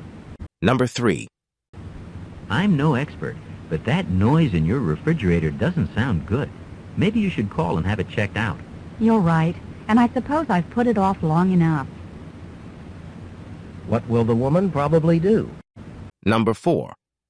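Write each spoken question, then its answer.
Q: What will the woman probably do?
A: Call someone to check the refrigerator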